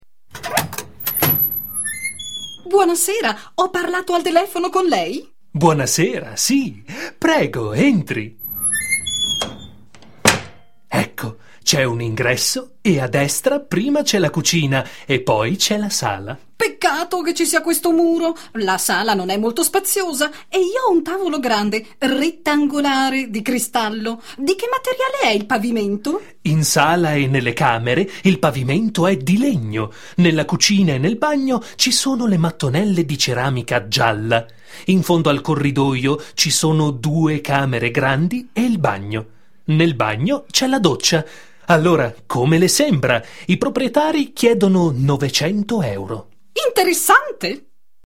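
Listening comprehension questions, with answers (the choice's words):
Ascolta i dialoghi e inserisci le parole mancanti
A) LEGNO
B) DOCCIA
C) BUONASERA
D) NOVECENTO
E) PAVIMENTO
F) GIALLA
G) RETTANGOLARE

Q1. ________________________ , ho parlato al telefono con lei?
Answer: BUONASERA

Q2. io ho un tavolo grande, ________________________ di cristallo.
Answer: RETTANGOLARE

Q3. In sala e nelle camere il pavimento è di ________________________ ,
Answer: LEGNO

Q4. nella cucina e nel bagno ci sono le mattonelle di ceramica ________________________ .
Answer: GIALLA

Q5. Nel bagno c'è la ________________________ .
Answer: DOCCIA

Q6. I proprietari chiedono ________________________ euro.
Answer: NOVECENTO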